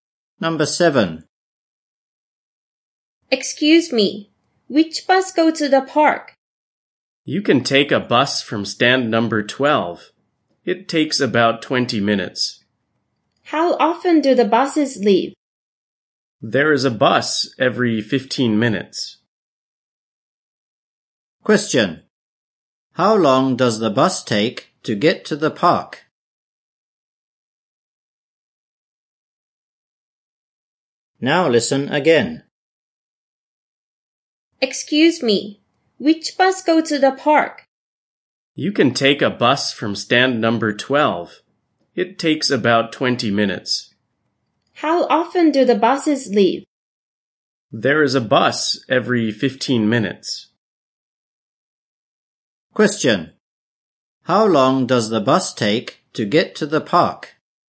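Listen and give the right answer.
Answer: About 20 minutes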